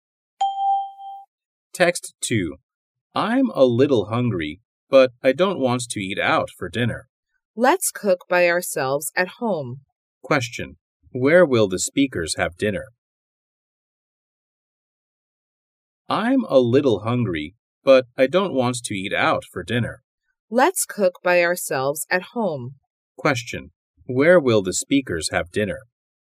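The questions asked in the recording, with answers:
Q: Where will the speakers have dinner?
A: At home.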